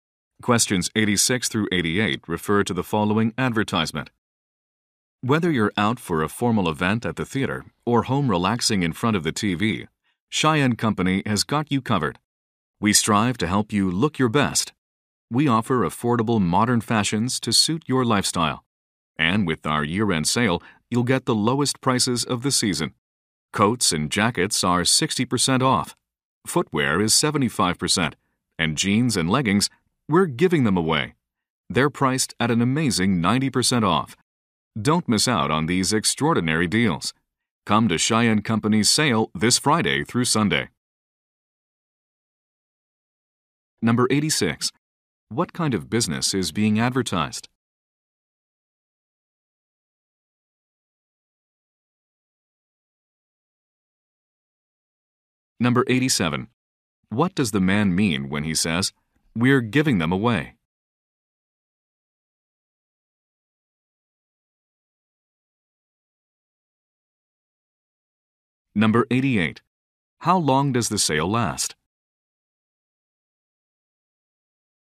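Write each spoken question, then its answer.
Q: What kind of business is being advertised?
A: A clothing store

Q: What does the man mean when he says, "We're giving them away"?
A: The items are extremely discounted (90% off)

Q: How long does the sale last?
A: Three days (Friday through Sunday)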